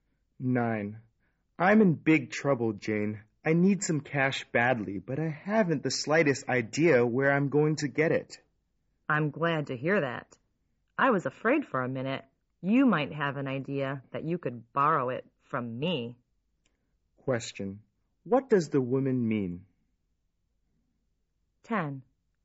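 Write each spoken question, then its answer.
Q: What does the woman mean?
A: She won't lend him any money.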